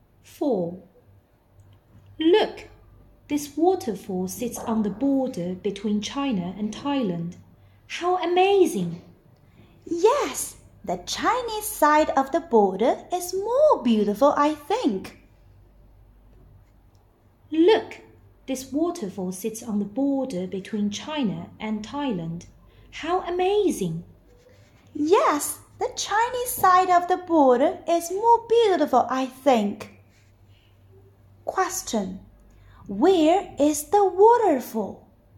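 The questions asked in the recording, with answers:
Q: Where is the waterfall?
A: On the border between China and Thailand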